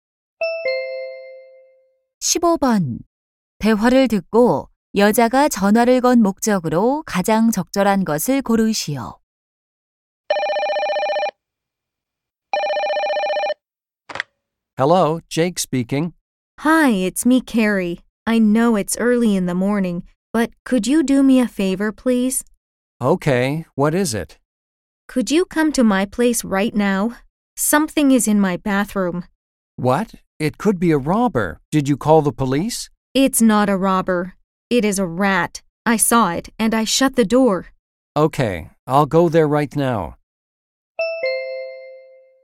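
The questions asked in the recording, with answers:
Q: 대화를 듣고 여자가 전화를 건 목적으로 가장 적절한 것을 고르시오.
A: 욕실에 쥐가 있어 와 달라고 부탁하려고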